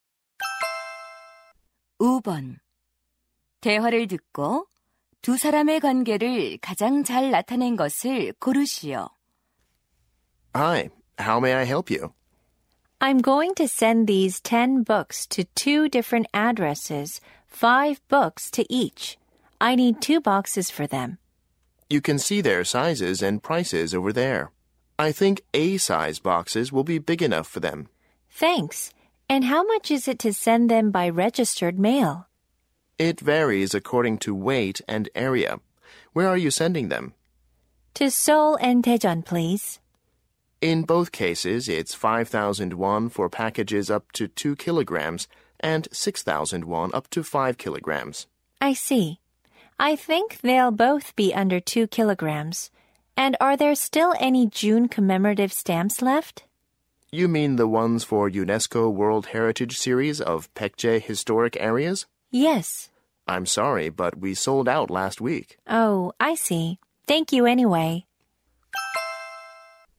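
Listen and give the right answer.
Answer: 우체국 직원 - 고객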